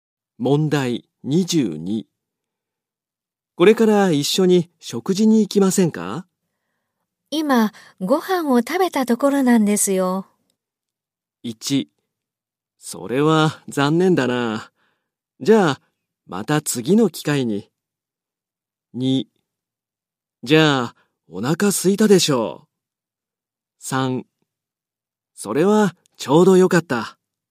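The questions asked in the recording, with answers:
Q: これから一緒に食事に行きませんか?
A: 1: それは残念だな。じゃあ、また次の機会に。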